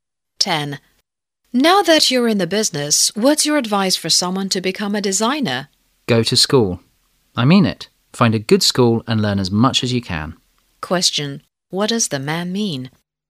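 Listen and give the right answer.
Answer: Going to a good school to learn is important to become a designer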